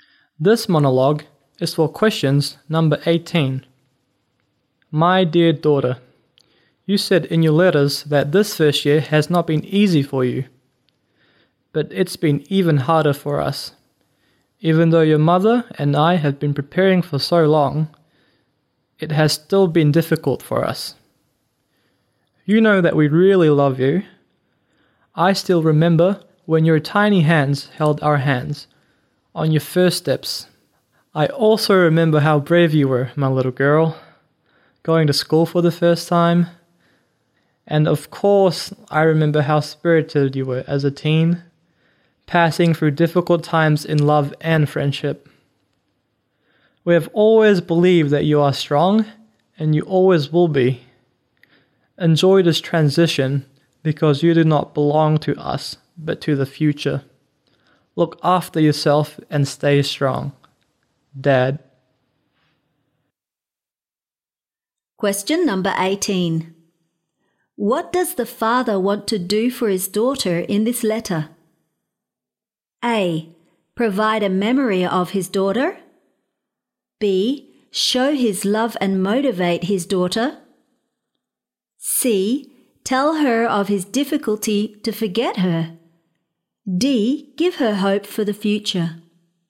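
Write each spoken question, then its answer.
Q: What does the father want to do for his daughter in this letter?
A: B: Show his love and motivate his daughter.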